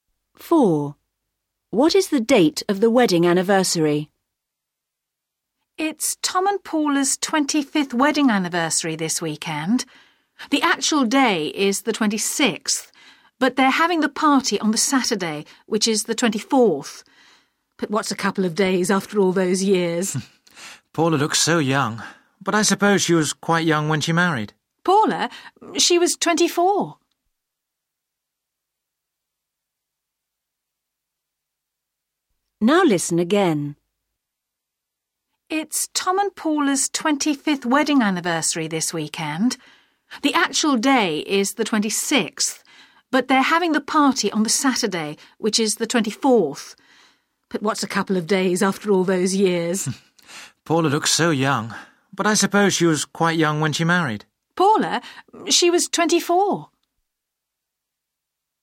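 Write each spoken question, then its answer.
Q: What is the date of the wedding anniversary?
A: The 26th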